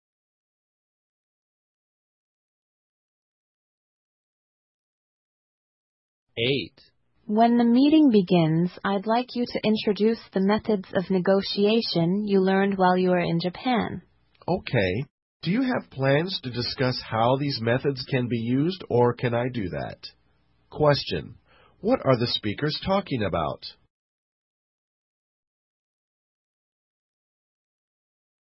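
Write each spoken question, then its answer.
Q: What are the speakers talking about?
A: Introducing negotiation methods learned in Japan at a meeting.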